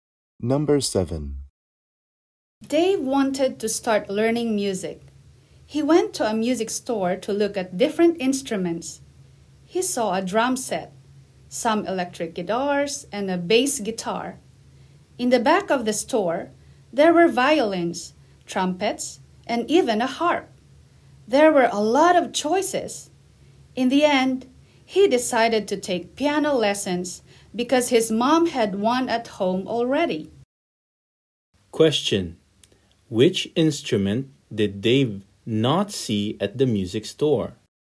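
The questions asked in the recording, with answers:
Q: Question: Which instrument did Dave not see at the music store?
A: Piano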